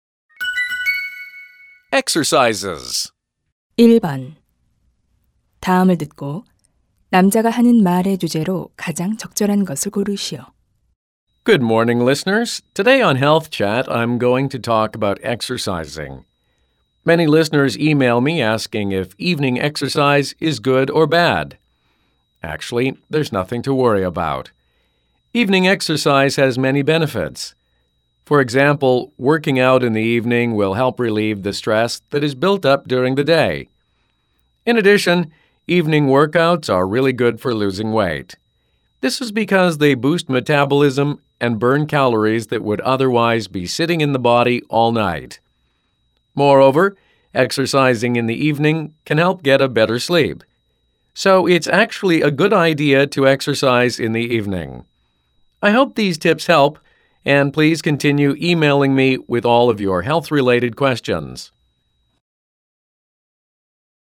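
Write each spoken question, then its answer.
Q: 다음을 듣고 남자가 하는 말의 주제로 가장 적절한 것을 고르시오.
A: 저녁 운동의 이점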